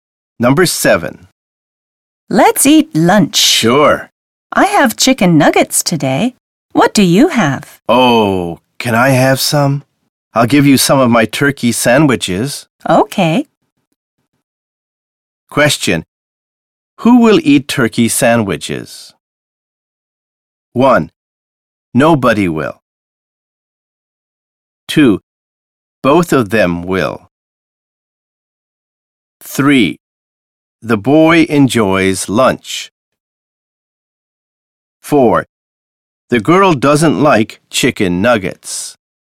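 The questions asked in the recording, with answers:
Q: Who will eat turkey sandwiches?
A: 2: Both of them will.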